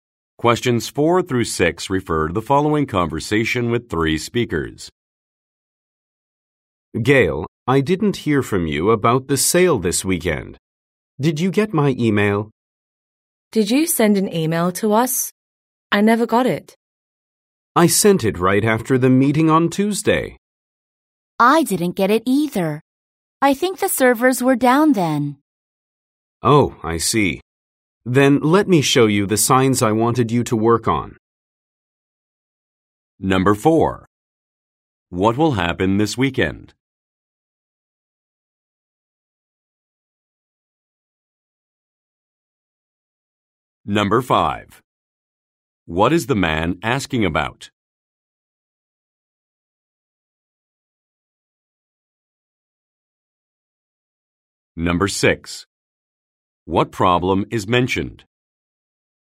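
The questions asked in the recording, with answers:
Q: What will happen this weekend?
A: A sale.

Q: What problem is mentioned?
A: The servers were down.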